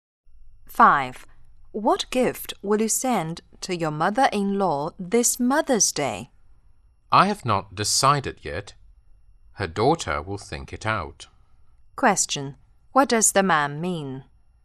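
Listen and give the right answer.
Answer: His wife will decide on the gift.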